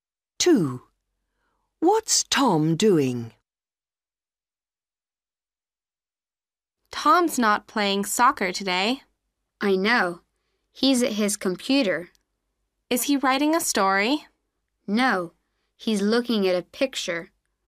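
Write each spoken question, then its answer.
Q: What's Tom doing?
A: Looking at a picture on his computer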